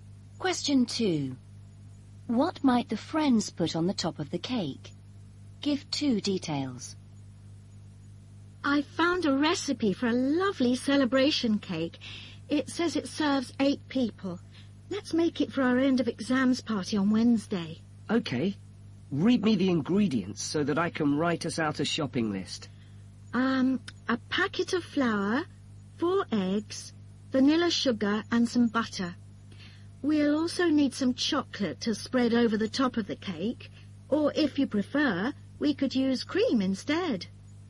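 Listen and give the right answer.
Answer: Chocolate or cream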